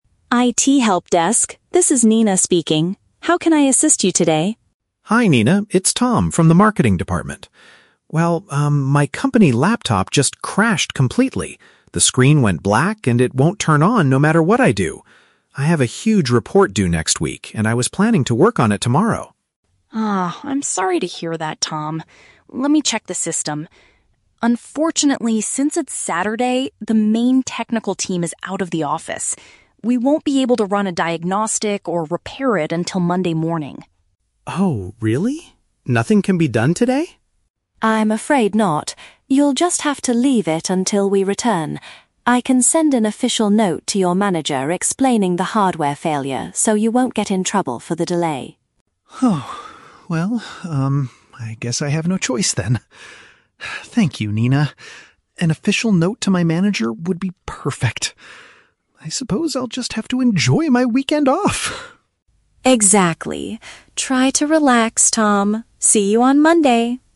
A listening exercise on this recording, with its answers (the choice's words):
Listen to the phone conversation between an employee (Tom) and an IT support staff member (Nina), and choose the correct answer (A, B, or C).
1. What is the main problem Tom is calling about?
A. He forgot his password to access the marketing system.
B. His computer suddenly stopped functioning completely.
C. He wants to borrow a new device for his weekend work.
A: His computer suddenly stopped functioning completely.

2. Why can't the technical team fix the issue immediately?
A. They do not have the right tools to run a diagnostic.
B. The manager told them to prioritize other departments.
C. The staff are not working because it is the weekend.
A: The staff are not working because it is the weekend.

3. How does Tom feel at the end of the conversation?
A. Anxious because his manager will punish him on Monday.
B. Glad that he has a good excuse to rest for a couple of days.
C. Angry because the IT staff refused to help him solve the issue.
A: Glad that he has a good excuse to rest for a couple of days.

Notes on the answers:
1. Tom says his laptop "crashed completely" and "won't turn on." "Stopped functioning completely" is a direct paraphrase of crashing and not turning on.
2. Nina explains that "since it's Saturday" (the weekend), the team is "out of the office" (not working).
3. Tom says, "I suppose I'll just have to enjoy my weekend off!" and sounds very relieved. Getting an "official note" gives him a good excuse to rest.

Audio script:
Nina: IT Helpdesk, this is Nina speaking. How can I assist you today?
Tom: Hi Nina, it's Tom from the marketing department. Well, um, my company laptop just crashed completely. The screen went black and it won't turn on no matter what I do. I have a huge report due next week, and I was planning to work on it tomorrow.
Nina: Ah, I'm sorry to hear that, Tom. Let me check the system... Unfortunately, since it's Saturday, the main technical team is out of the office. We won't be able to run a diagnostic or repair it until Monday morning.
Tom: Oh... really? Nothing can be done today?
Nina: I'm afraid not. You'll just have to leave it until we return. I can send an official note to your manager explaining the hardware failure so you won't get in trouble for the delay.
Well, um, I guess I have no choice then. Thank you, Nina. An official note to my manager would be perfect. I suppose I'll just have to enjoy my weekend off!
Nina: Exactly. Try to relax, Tom. See you on Monday.